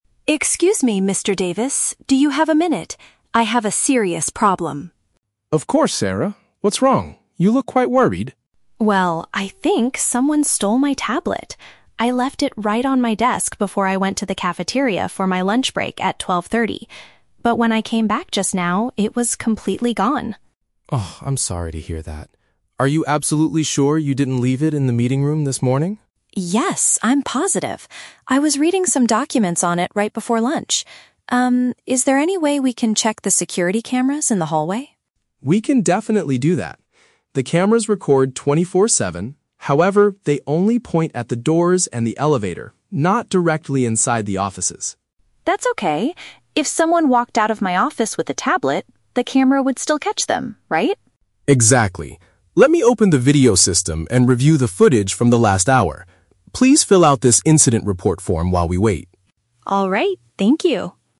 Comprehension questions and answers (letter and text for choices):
Listen to the conversation between an employee and a security guard. Choose the correct answer (A, B, or C) for each question.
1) What is Sarah's main problem?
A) She forgot some important documents in the meeting room.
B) Her electronic device is missing from her workplace.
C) She left her wallet in the company's cafeteria.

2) What does Sarah ask Mr. Davis to do?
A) Review the video recordings in the corridor.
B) Go into her office to search for the stolen item.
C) Call the local police department immediately.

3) What limitation do the building's cameras have?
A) They stop working during the staff's lunch break.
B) They only save the recorded videos for one hour.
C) They do not film the inside of the work rooms.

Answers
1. B) Her electronic device is missing from her workplace.
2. A) Review the video recordings in the corridor.
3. C) They do not film the inside of the work rooms.

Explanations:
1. The Key: Sarah says, "someone stole my tablet. I left it right on my desk". A tablet is an electronic device, and her desk is her workplace. The Trap (A): Mr. Davis asks if she left it in the "meeting room", and Sarah mentions reading "documents", but she did not lose her documents. She lost her tablet. Plausible but not mentioned (C): She mentions going to the "cafeteria" for lunch, but she never says she lost a wallet there.
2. The Key: Sarah asks, "can we check the security cameras in the hallway?" Checking cameras means reviewing video recordings, and a hallway is a corridor. The Trap (B): Sarah's tablet was taken from her "office", but she does not ask Mr. Davis to go in there and search for it. She specifically asks to check the cameras. Plausible but not mentioned (C): Calling the police is a normal action when something is stolen, but Sarah does not ask him to do this in the conversation.
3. The Key: Mr. Davis explains that the cameras "only point at the doors and the elevator, not directly inside the offices." This means they do not film the inside of the work rooms. The Trap (A): The theft happened during the "lunch break", but Mr. Davis says the cameras "record 24/7" (all day and night), so they do not stop working. The Trap (B): Mr. Davis says he will "review the footage from the last hour", but he doesn't say the cameras only save videos for one hour.

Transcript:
Sarah: Excuse me, Mr. Davis. Do you have a minute? I have a serious problem.
Mr. Davis: Of course, Sarah. What's wrong? You look quite worried.
Sarah: Well, I think someone stole my tablet. I left it right on my desk before I went to the cafeteria for my lunch break at 12:30. But when I came back just now, it was completely gone.
Mr. Davis: Oh, I'm sorry to hear that. Are you absolutely sure you didn't leave it in the meeting room this morning?
Sarah: Yes, I'm positive. I was reading some documents on it right before lunch. Um, is there any way we can check the security cameras in the hallway?
Mr. Davis: We can definitely do that. The cameras record 24/7. However, they only point at the doors and the elevator, not directly inside the offices.
Sarah: That's okay. If someone walked out of my office with a tablet, the camera would still catch them, right?
Mr. Davis: Exactly. Let me open the video system and review the footage from the last hour. Please fill out this incident report form while we wait.
Sarah: Alright, thank you.